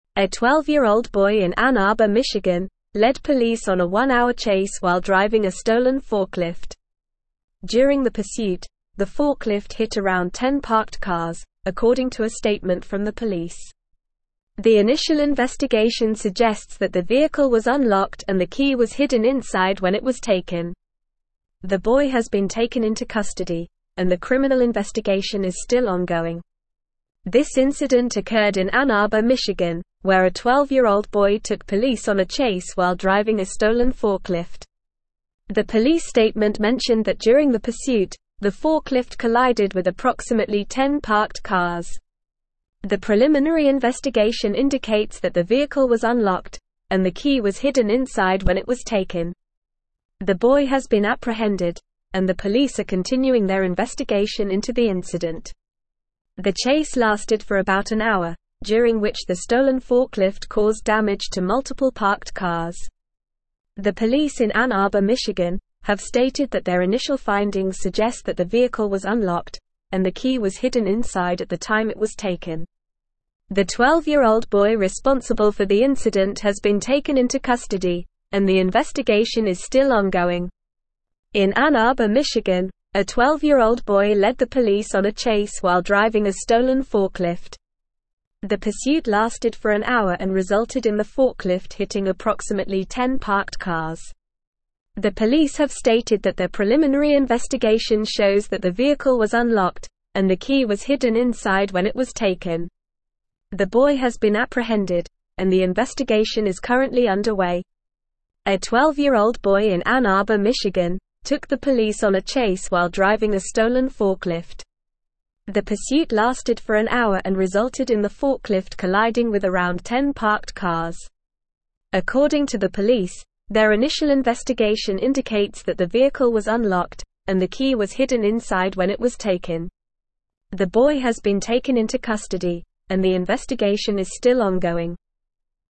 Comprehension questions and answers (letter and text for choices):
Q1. Where did the incident with the stolen forklift occur?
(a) New York City, New York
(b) Los Angeles, California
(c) Ann Arbor, Michigan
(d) Chicago, Illinois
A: (c) Ann Arbor, Michigan

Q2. How old was the boy who led the police on the chase?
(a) 16 years old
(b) 10 years old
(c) 14 years old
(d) 12 years old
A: (d) 12 years old

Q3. How long did the chase with the stolen forklift last?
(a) 30 minutes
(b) 2 hours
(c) About an hour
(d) 15 minutes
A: (c) About an hour

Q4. How many parked cars did the forklift hit during the pursuit?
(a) 5 cars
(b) Approximately 10 cars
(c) 20 cars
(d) 3 cars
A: (b) Approximately 10 cars

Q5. What did the police statement suggest about the stolen forklift?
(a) The vehicle was unlocked and the key was hidden inside.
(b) The vehicle was locked and the key was left inside.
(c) The vehicle was unlocked and the key was left inside.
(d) The vehicle was locked and the key was hidden inside.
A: (a) The vehicle was unlocked and the key was hidden inside.

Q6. What is the status of the criminal investigation?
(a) It has been concluded.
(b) It has been suspended.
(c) It is inconclusive.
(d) It is still ongoing.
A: (d) It is still ongoing.

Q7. What happened to the boy responsible for the incident?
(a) He has been taken into custody.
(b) He was released without charges.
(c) He was given a warning.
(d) He was sent to a juvenile detention center.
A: (a) He has been taken into custody.

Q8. What is the location mentioned in the article?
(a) Detroit, Michigan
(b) Ann Arbor, Michigan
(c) Lansing, Michigan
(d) Grand Rapids, Michigan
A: (b) Ann Arbor, Michigan

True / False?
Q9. The police statement mentioned that the forklift collided with approximately 5 parked cars during the chase.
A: False

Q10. The forklift hit around 10 parked cars during the pursuit, according to a statement from the police.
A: True

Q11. The vehicle was locked and the key was not hidden inside when it was taken, based on the initial investigation.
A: False

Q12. The girl has not been taken into custody following the incident.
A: False

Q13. The criminal investigation is still ongoing.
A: True

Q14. The incident occurred in Detroit, Michigan.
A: False

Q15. A 12-year-old boy in Ann Arbor, Michigan, led (1)______ on a one-hour chase while (2)______ a (3)______ forklift.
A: police

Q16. A 12-year-old boy in Ann Arbor, Michigan, led (1)______ on a one-hour chase while (2)______ a (3)______ forklift.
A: driving

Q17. A 12-year-old boy in Ann Arbor, Michigan, led (1)______ on a one-hour chase while (2)______ a (3)______ forklift.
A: stolen

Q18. The initial investigation suggests that the vehicle was unlocked and the key was (4)______ inside when it was taken.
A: hidden

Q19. The boy has been apprehended, and the police are continuing their investigation into the (5)______.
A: incident

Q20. The chase lasted for about an hour, during which the stolen forklift (6)______ damage to multiple parked cars.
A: caused

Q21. The police in Ann Arbor, Michigan, have (7)______ that their initial (8)______ suggest that the (9)______ was unlocked, and the key was hidden inside at the time it was (10)______.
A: stated

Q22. The police in Ann Arbor, Michigan, have (7)______ that their initial (8)______ suggest that the (9)______ was unlocked, and the key was hidden inside at the time it was (10)______.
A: findings

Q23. The police in Ann Arbor, Michigan, have (7)______ that their initial (8)______ suggest that the (9)______ was unlocked, and the key was hidden inside at the time it was (10)______.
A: vehicle

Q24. The police in Ann Arbor, Michigan, have (7)______ that their initial (8)______ suggest that the (9)______ was unlocked, and the key was hidden inside at the time it was (10)______.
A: taken

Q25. The 12-year-old boy responsible for the incident has been taken into custody, and the (11)______ is still (12)______.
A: investigation

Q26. The 12-year-old boy responsible for the incident has been taken into custody, and the (11)______ is still (12)______.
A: ongoing

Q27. The boy has been apprehended, and the investigation is currently (13)______.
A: underway

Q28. A 12-year-old boy in Ann Arbor, Michigan, took the police on a chase while driving a stolen (14)______.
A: forklift

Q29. According to the police, their (15)______ investigation indicates that the vehicle was unlocked, and the key was hidden inside when it was taken.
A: initial

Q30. The boy has been taken into (16)______, and the investigation is still ongoing.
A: custody

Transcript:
A 12-year-old boy in Ann Arbor, Michigan, led police on a one-hour chase while driving a stolen forklift. During the pursuit, the forklift hit around 10 parked cars, according to a statement from the police. The initial investigation suggests that the vehicle was unlocked and the key was hidden inside when it was taken. The boy has been taken into custody, and the criminal investigation is still ongoing.
This incident occurred in Ann Arbor, Michigan, where a 12-year-old boy took police on a chase while driving a stolen forklift. The police statement mentioned that during the pursuit, the forklift collided with approximately 10 parked cars. The boy has been apprehended, and the police are continuing their investigation into the incident.
The chase lasted for about an hour, during which the stolen forklift caused damage to multiple parked cars. The police in Ann Arbor, Michigan, have stated that their initial findings suggest that the vehicle was unlocked, and the key was hidden inside at the time it was taken.
The pursuit lasted for an hour and resulted in the forklift hitting approximately 10 parked cars.
The pursuit lasted for an hour and resulted in the forklift colliding with around 10 parked cars.

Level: Level 4